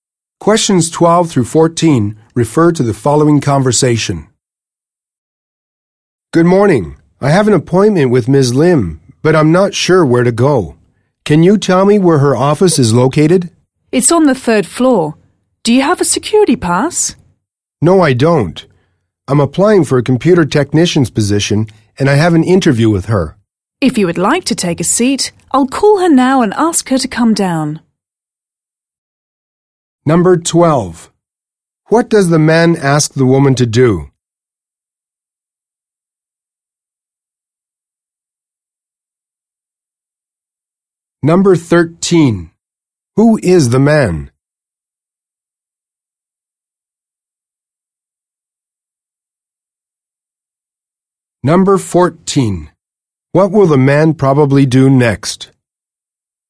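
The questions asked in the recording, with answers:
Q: What does the man ask the woman to do?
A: Tell him where Ms. Lim's office is

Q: Who is the man?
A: A job applicant for a computer technician's position

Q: What will the man probably do next?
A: Take a seat and wait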